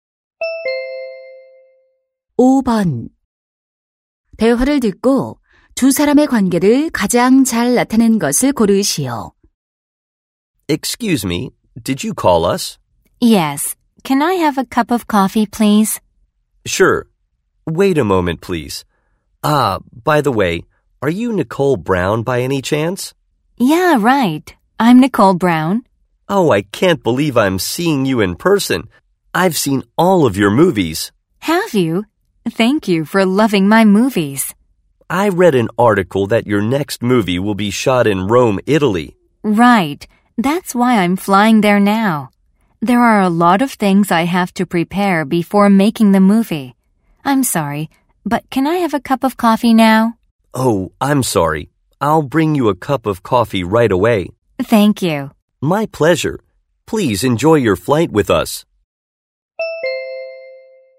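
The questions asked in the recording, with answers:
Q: 대화를 듣고 두 사람의 관계를 가장 잘 나타낸 것을 고르시오.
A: 승무원 - 영화배우(승객)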